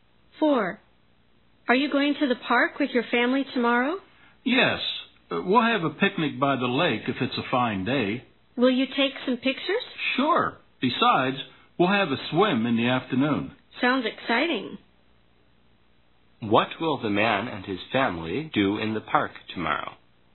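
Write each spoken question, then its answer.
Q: What will the man and his family do in the park tomorrow?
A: Have a picnic by the lake, take pictures and swim in the afternoon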